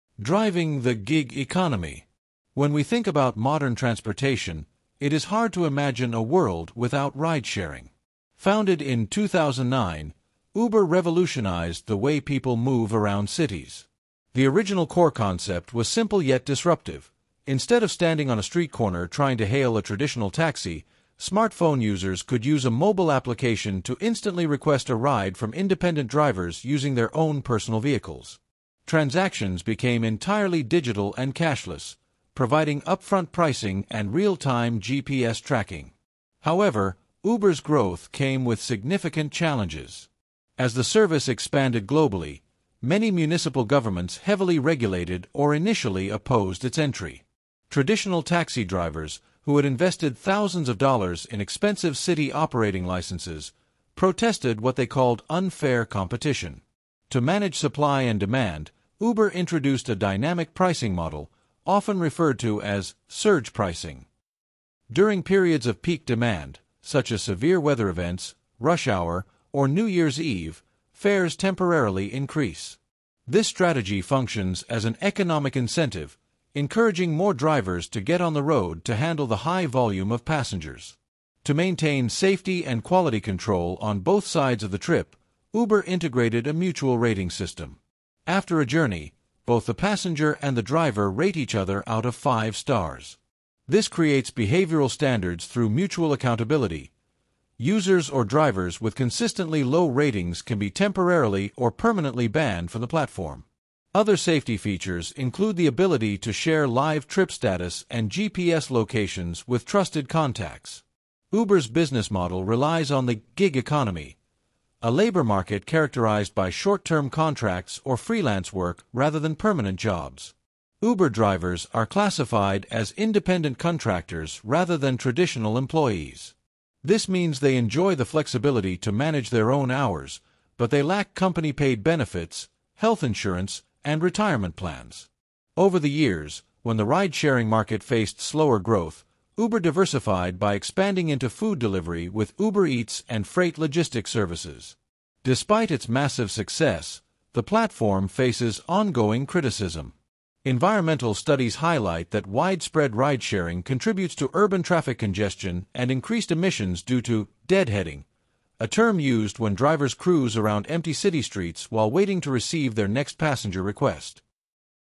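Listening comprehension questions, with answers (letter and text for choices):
Choose the correct answer:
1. What was the original core concept behind the creation of Uber?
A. To provide affordable long-distance public transit alternatives.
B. To allow smartphone users to hail a ride from independent drivers instantly.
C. To establish a premium, luxury limousine fleet owned entirely by the company.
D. To replace standard delivery services for commercial corporations.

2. How does Uber's dynamic pricing model (surge pricing) function during periods of peak demand?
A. Fares drop to attract more passengers to the platform.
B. Prices remain static, but wait times automatically double.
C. Fares temporarily increase to incentivize more drivers to get on the road.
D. The company subsidizes the cost so neither passenger nor driver loses money.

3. What is a primary distinction between an "independent contractor" and a "traditional employee" within the gig economy?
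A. Independent contractors must work fixed, standard shifts every week.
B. Independent contractors typically manage their own hours but lack company-paid benefits.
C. Traditional employees are entirely responsible for purchasing their own commercial tools.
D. Traditional employees do not have income tax deducted from their paychecks.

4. Why did many municipal governments initially oppose or heavily regulate Uber's entry into their markets?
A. Because Uber refused to use GPS tracking for passenger safety.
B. Because it created unfair competition for traditional taxis that had paid for expensive operating licenses.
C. Because the city wanted to buy Uber and turn it into a public utility.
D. Because passengers preferred using cash, which cities could not easily track.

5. What role does the mutual rating system play in the Uber ecosystem?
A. It determines how much income tax a driver is required to pay to the government.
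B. It enforces behavioral standards for both drivers and passengers through accountability.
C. It allows passengers to negotiate the final price of the trip after it ends.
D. It ranks drivers so that only the highest-rated drivers receive electric vehicles.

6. Which of the following describes a key benefit for consumers using a ridesharing app over a traditional taxi?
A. Ridesharing guarantees that every vehicle will have identical interiors and seating.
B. Passengers can view upfront pricing and track their vehicle's arrival in real time.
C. Ridesharing apps allow passengers to travel without an internet connection.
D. Drivers are legally permitted to ignore standard speed limits to ensure fast arrival.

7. How did Uber diversify its business model when the ridesharing sector experienced slower growth?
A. By shifting completely to manufacturing its own commercial airplanes.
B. By establishing physical retail stores to sell auto parts to the general public.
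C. By expanding into food delivery and freight logistics services.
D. By banning all independent drivers and hiring professional chauffeured staff.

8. What is a common safety feature integrated directly into the Uber application?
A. An automated system that locks the vehicle doors if a passenger tries to exit early.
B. The ability to share trip status and live GPS tracking with trusted contacts.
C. A physical partition shield provided to every driver by the corporate office.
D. An optional breathalyzer test required before a passenger can open the door.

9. What environmental challenge has been frequently associated with the widespread use of ridesharing services?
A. Increased urban traffic congestion and deadheading emissions.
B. A sudden shortage of rubber due to rapid tire wear across the globe.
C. The destruction of satellite networks from excessive app usage data.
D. An increase in the abandonment of older vehicles on rural highways.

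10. Which phrase best describes the concept of "the gig economy" as exemplified by companies like Uber?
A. A market dominated by long-term, guaranteed jobs with public pensions.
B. An economic system dependent on physical trade, bartering, and cash transactions.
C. A labor market characterized by short-term contracts or freelance work rather than permanent jobs.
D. An industrial framework focused entirely on corporate manufacturing and heavy machinery.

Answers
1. B. To allow smartphone users to hail a ride from independent drivers instantly.
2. C. Fares temporarily increase to incentivize more drivers to get on the road.
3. B. Independent contractors typically manage their own hours but lack company-paid benefits.
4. B. Because it created unfair competition for traditional taxis that had paid for expensive operating licenses.
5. B. It enforces behavioral standards for both drivers and passengers through accountability.
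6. B. Passengers can view upfront pricing and track their vehicle's arrival in real time.
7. C. By expanding into food delivery and freight logistics services.
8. B. The ability to share trip status and live GPS tracking with trusted contacts.
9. A. Increased urban traffic congestion and deadheading emissions.
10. C. A labor market characterized by short-term contracts or freelance work rather than permanent jobs.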